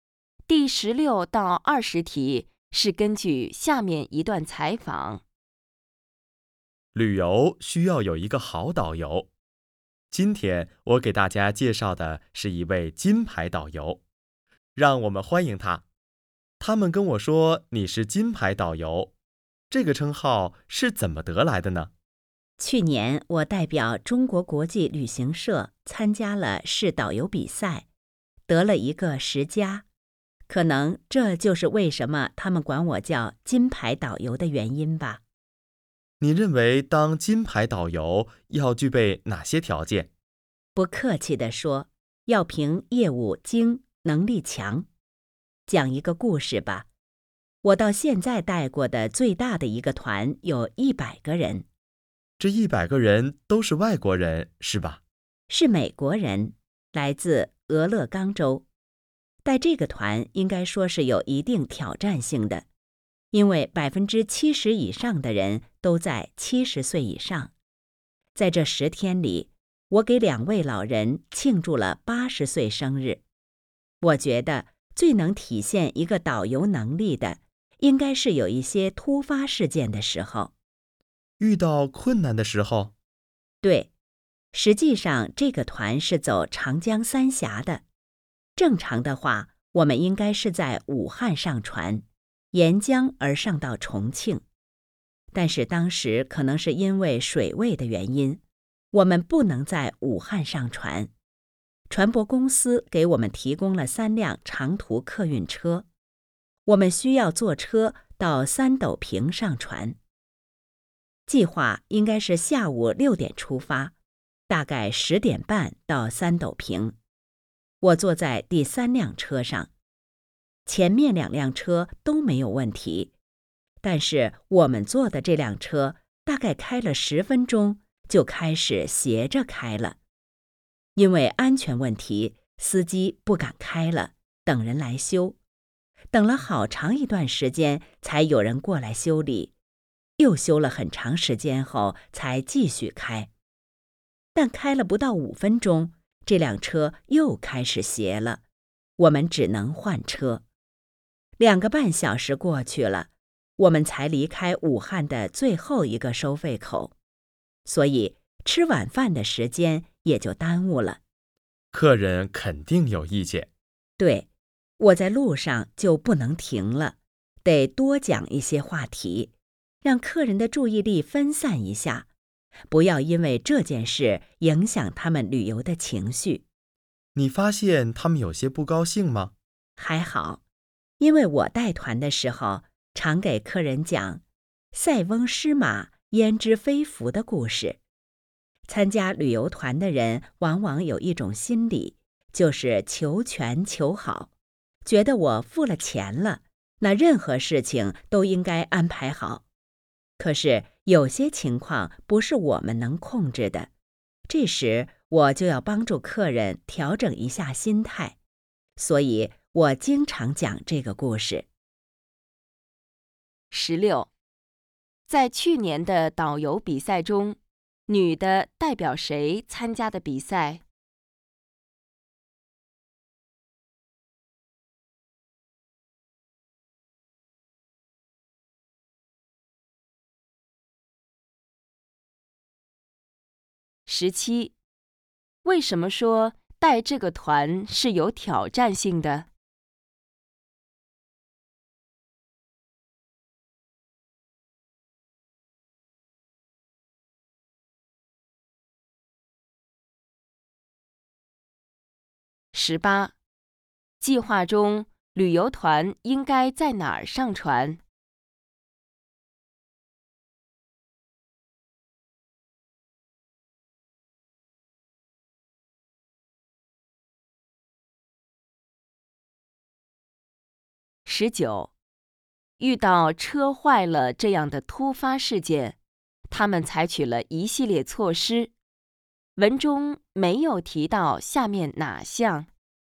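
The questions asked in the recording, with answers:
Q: 在去年的导游比赛中,女的代表谁参加的比赛?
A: 中国国际旅行社

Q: 为什么说带这个团是有挑战性的?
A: 70%以上的人都在70岁以上

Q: 计划中旅游团应该在哪儿上船?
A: 武汉

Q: 女的为什么在带团的时候常讲塞翁失马焉知非福的故事?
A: 帮助客人调整心态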